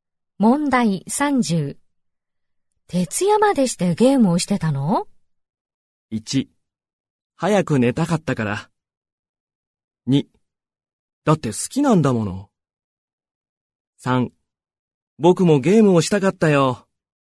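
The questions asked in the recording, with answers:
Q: 徹夜までしてゲームをしてたの?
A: 2: だって好きなんだもの。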